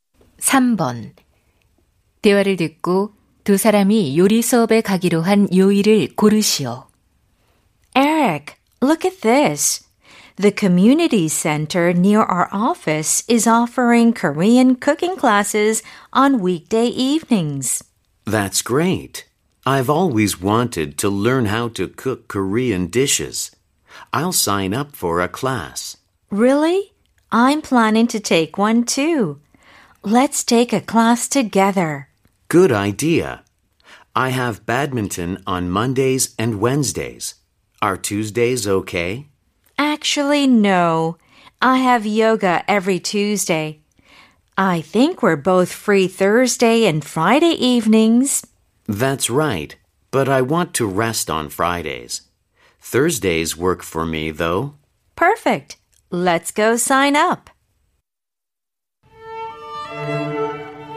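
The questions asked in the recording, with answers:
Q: 대화를 듣고 두 사람이 요리 수업에 가기로 한 요일을 고르시오.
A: 목요일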